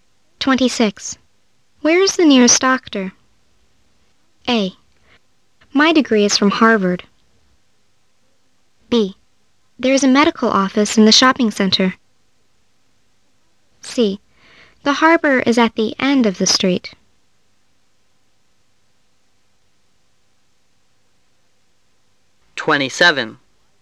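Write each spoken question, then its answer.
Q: Where is the nearest doctor?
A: B: There is a medical office in the shopping center.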